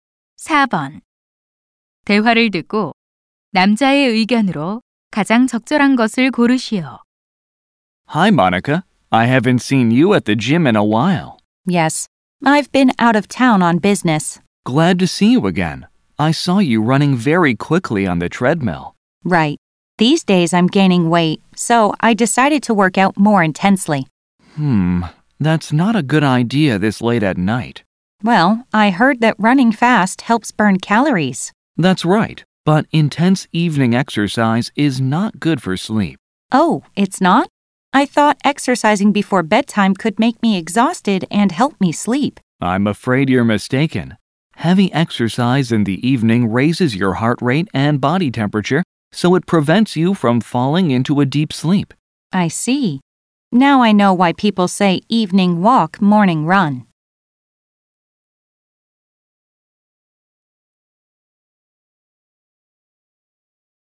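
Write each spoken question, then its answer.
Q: 대화를 듣고 남자의 의견으로 가장 적절한 것을 고르시오.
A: 저녁의 격렬한 운동은 숙면을 방해한다.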